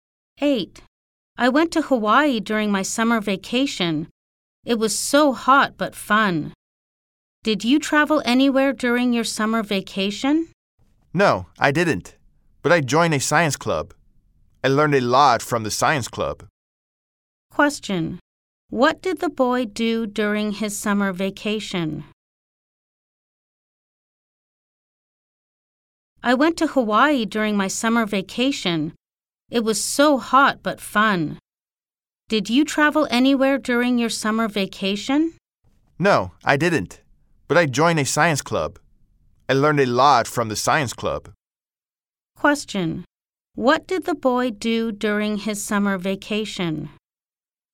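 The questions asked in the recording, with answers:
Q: What did the boy do during his summer vacation?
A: He joined a science club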